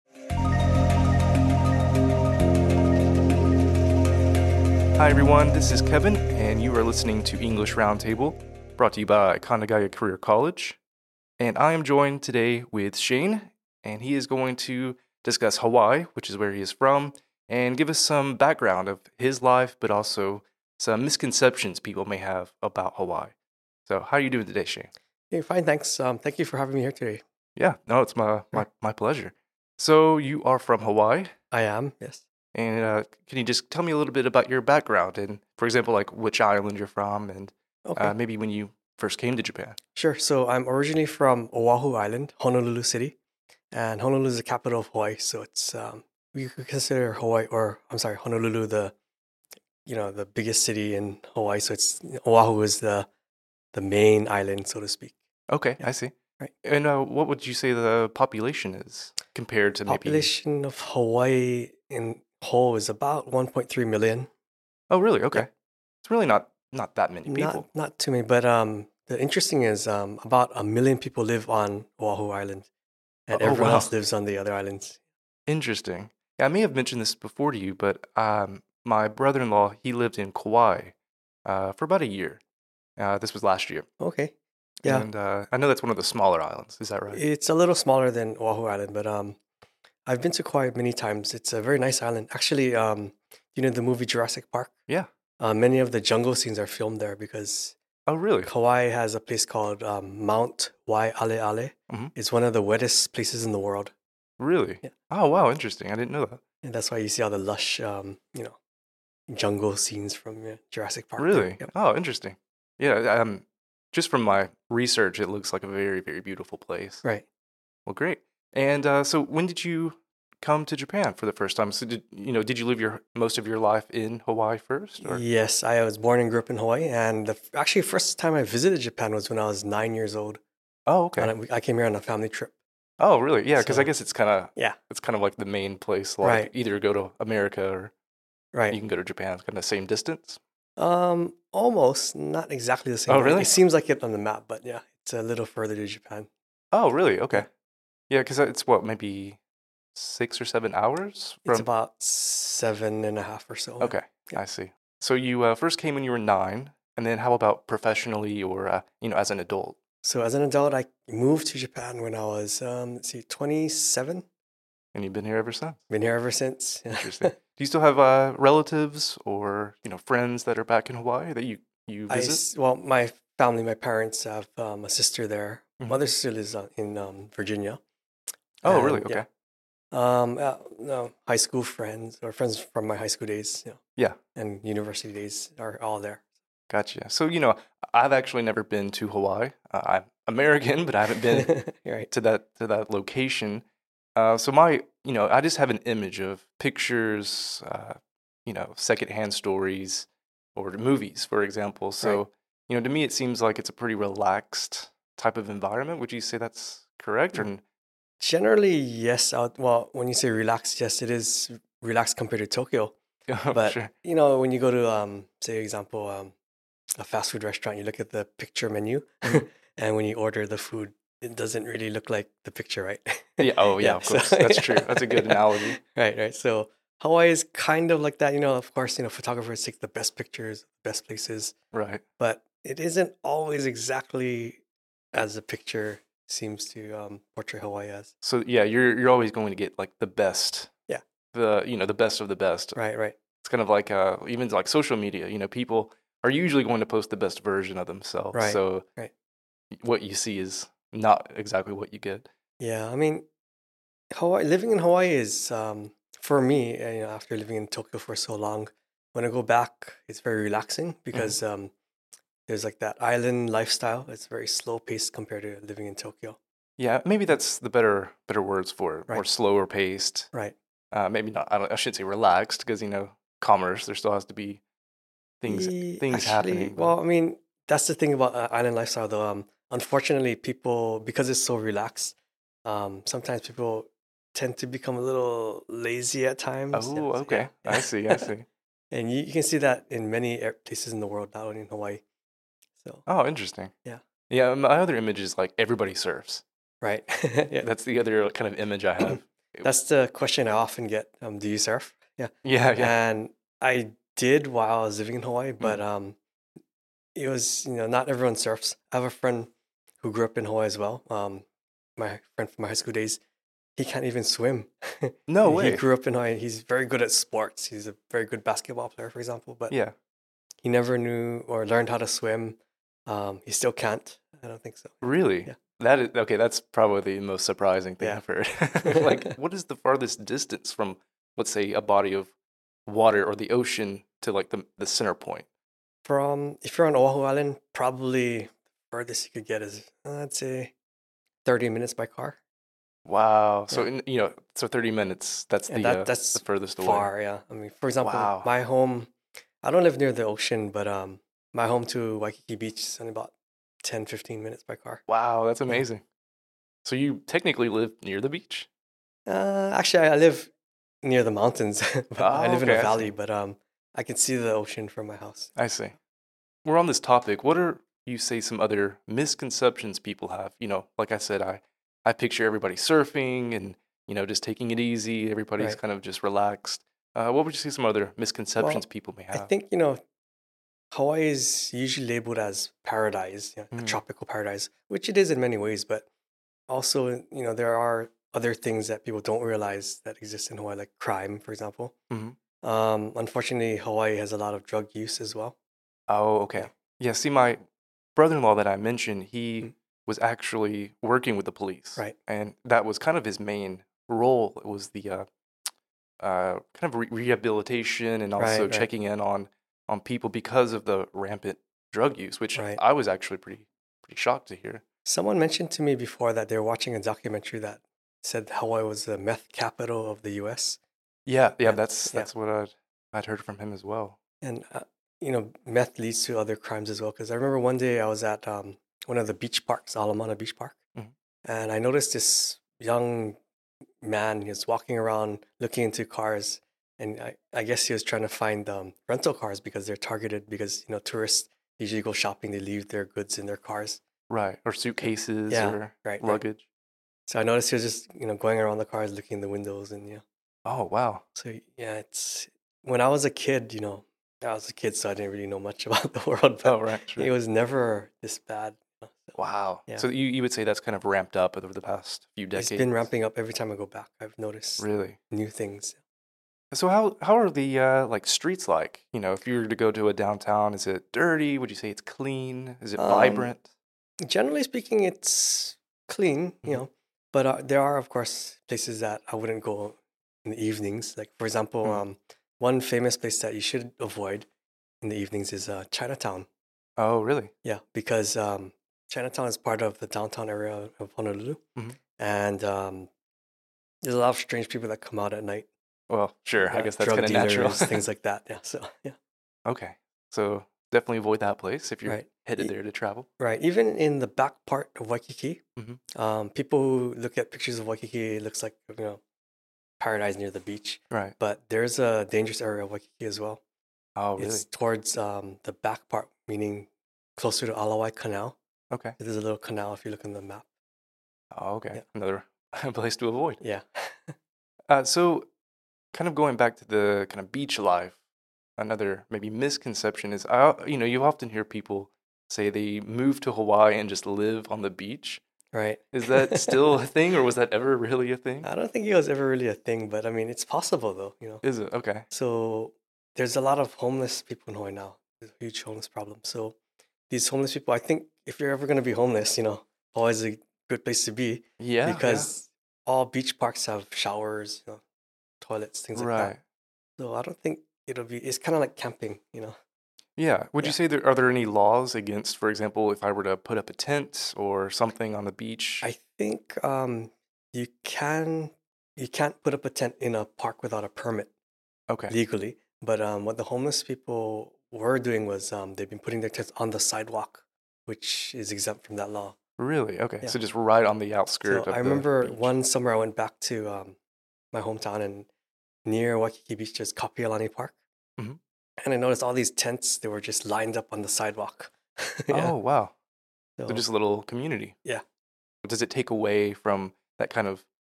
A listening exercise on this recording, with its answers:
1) Which island of Hawaii is Shayne from?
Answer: O'ahu, (Honolulu City, Hawaii)